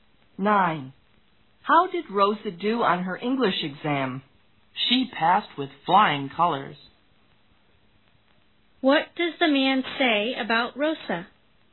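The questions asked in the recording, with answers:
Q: What does the man say about Rosa?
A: She did very well on her English exam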